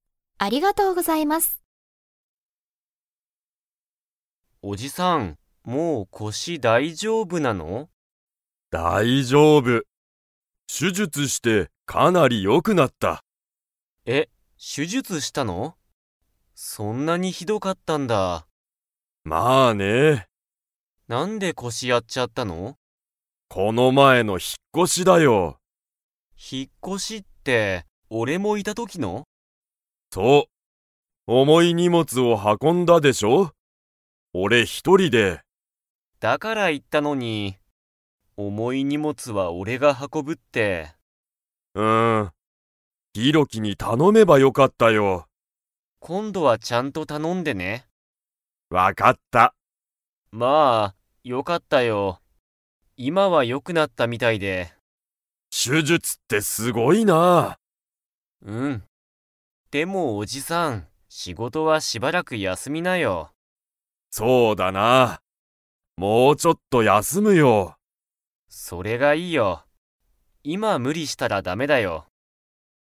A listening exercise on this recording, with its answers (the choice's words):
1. 引ひっ越こしの時とき、おじさんは何なにを運はこびましたか?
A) 小ちいさい車くるま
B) 高たかい手術しゅじゅつ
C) つらい仕事しごと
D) 重おもい荷物にもつ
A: 重おもい荷物にもつ

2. おじさんは、仕事しごとをもうちょっと 。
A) 休やすむ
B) 休やすまない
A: 休やすむ

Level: Level 4